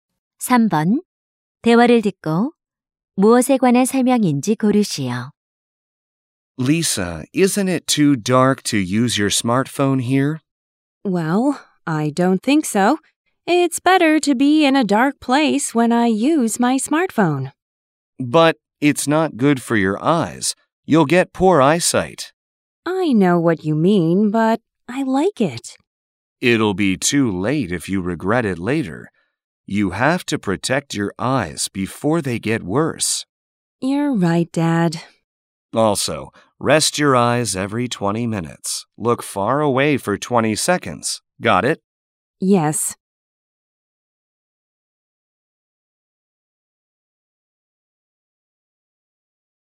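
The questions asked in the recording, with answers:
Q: 대화를 듣고 무엇에 관한 설명인지 고르시오.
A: 스마트폰 사용 시 눈 보호 방법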